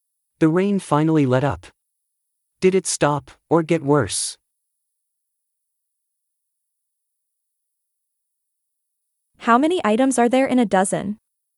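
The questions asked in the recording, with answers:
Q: The rain finally let up. Did it stop or get worse?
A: it stopped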